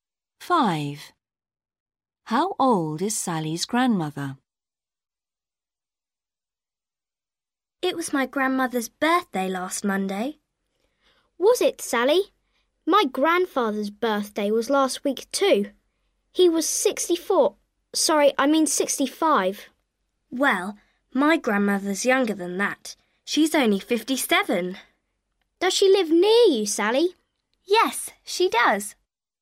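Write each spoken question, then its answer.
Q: How old is Sally's grandmother?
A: 57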